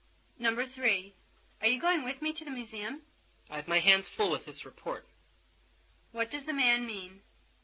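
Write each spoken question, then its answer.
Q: What does the man mean?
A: He is too busy with his report to go.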